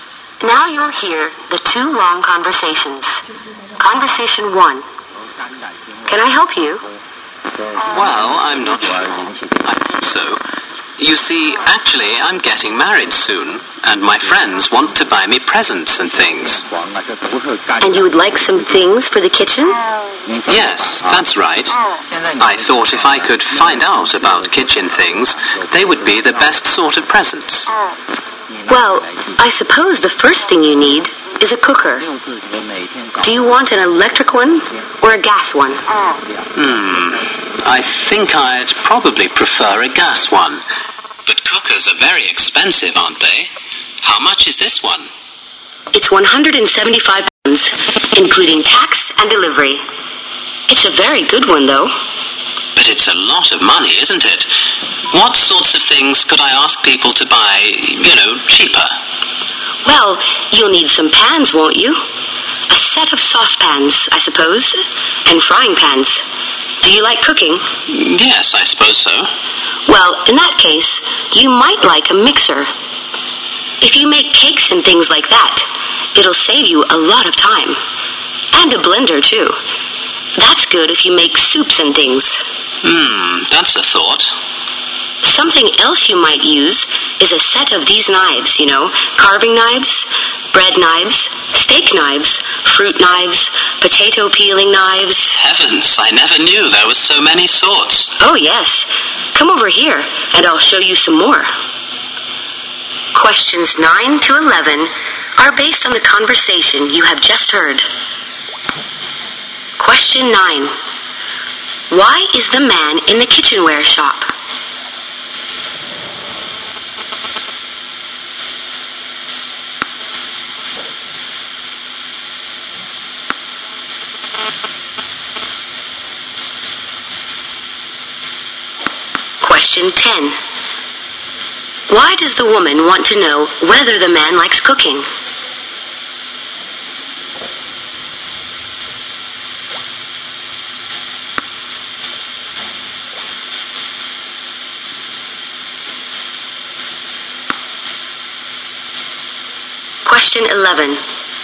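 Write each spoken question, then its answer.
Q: Why is the man in the kitchenware shop?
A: To find out about kitchen things his friends could buy as wedding presents.

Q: Why does the woman want to know whether the man likes cooking?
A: To recommend a mixer and blender.

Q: What does the man say he has never realized?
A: That there were so many sorts of knives.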